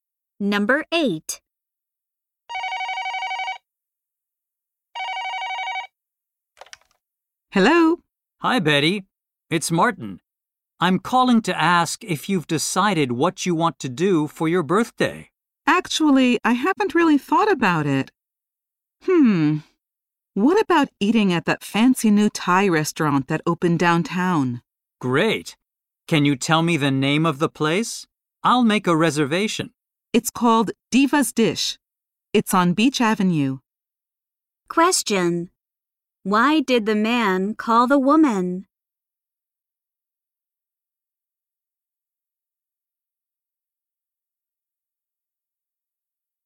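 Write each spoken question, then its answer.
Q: Why did the man call the woman?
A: To ask what she wants to do for her birthday.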